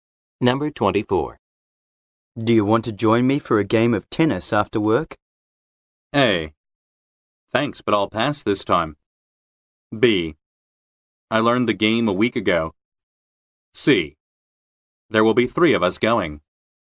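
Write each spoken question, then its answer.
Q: Do you want to join me for a game of tennis after work?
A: A: Thanks, but I'll pass this time.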